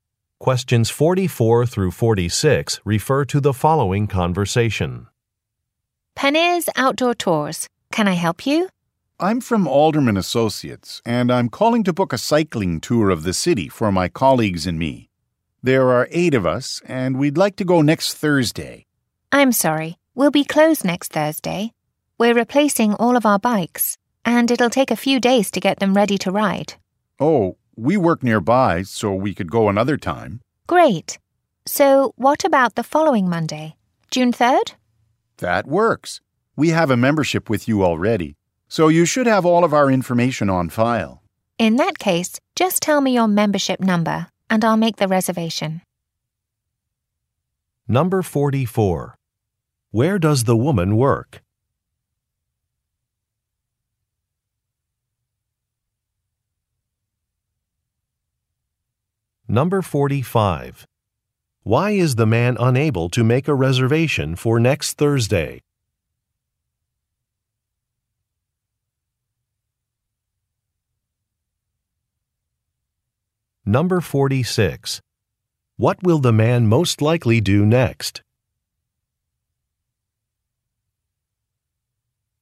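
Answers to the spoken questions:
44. At a tour company (Penny's Outdoor Tours)
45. The business will be closed because it is replacing its bikes
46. Give his membership number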